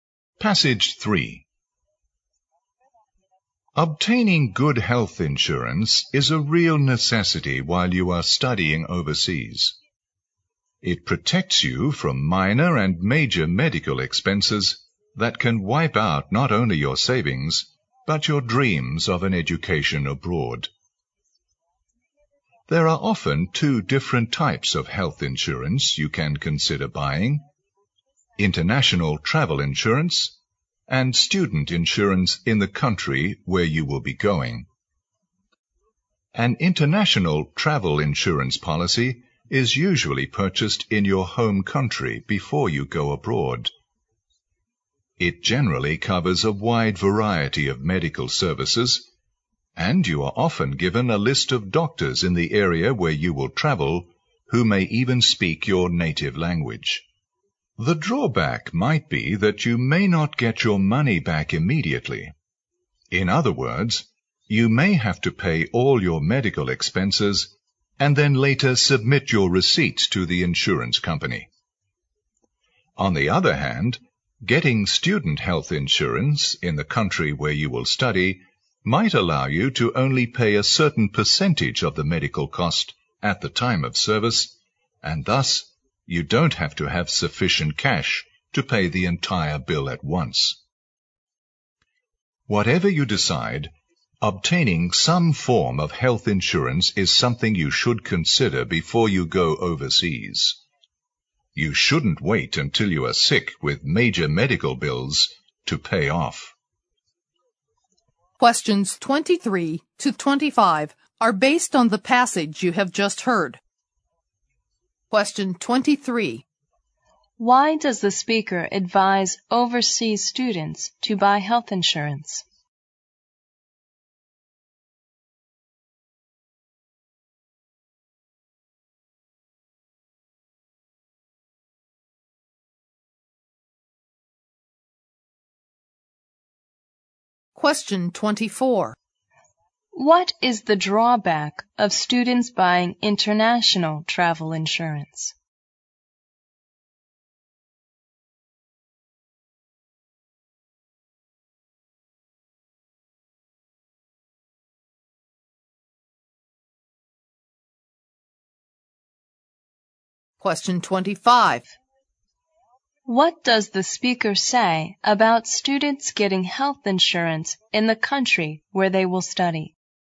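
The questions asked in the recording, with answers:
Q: Why does the speaker advise overseas students to buy health insurance?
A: It protects them from medical expenses that could wipe out their savings and their study plans.

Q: What is the drawback of students buying international travel insurance?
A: They may not get their money back right away; they have to pay first and claim later.

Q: What does the speaker say about students getting health insurance in the country where they will study?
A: They may only have to pay part of the medical cost at the time of service.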